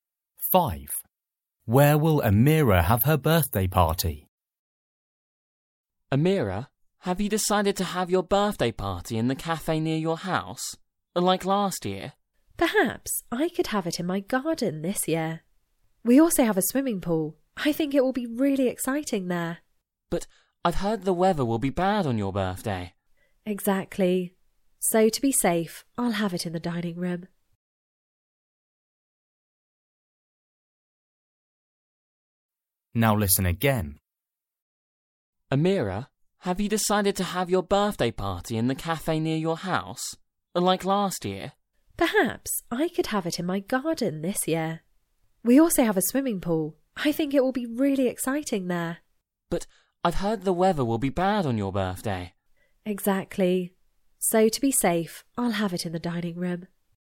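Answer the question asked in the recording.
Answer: In the dining room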